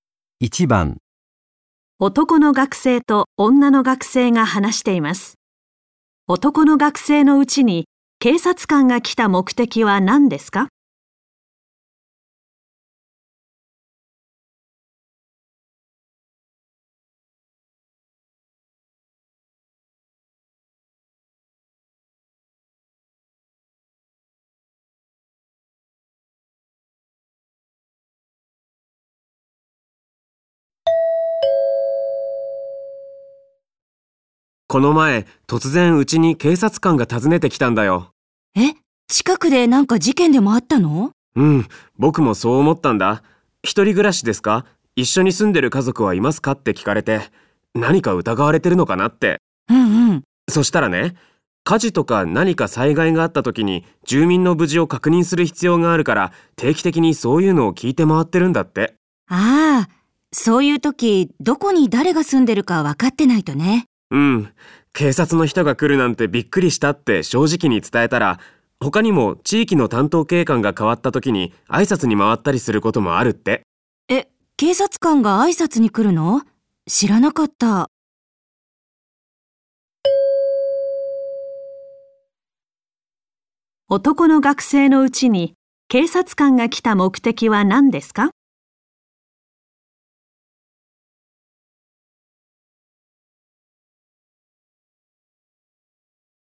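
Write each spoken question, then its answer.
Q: 男の学生のうちに警察官が来た目的は何ですか?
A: 災害時に住民の無事を確認するため、誰が住んでいるかを聞いて回っていた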